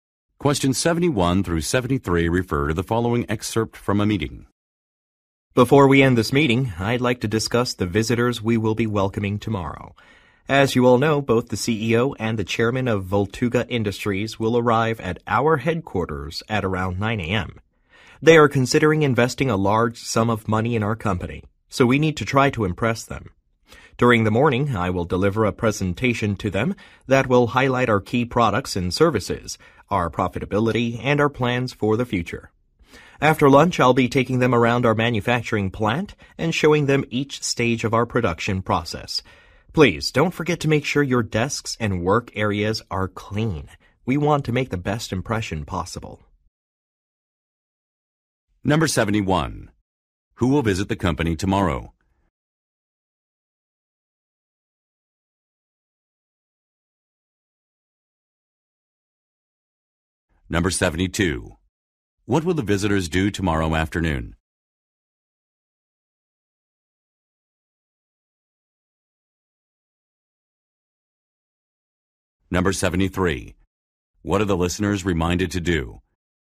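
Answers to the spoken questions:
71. The CEO and chairman of Voltuga Industries (potential investors)
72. Tour the manufacturing plant
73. Clean their desks and work areas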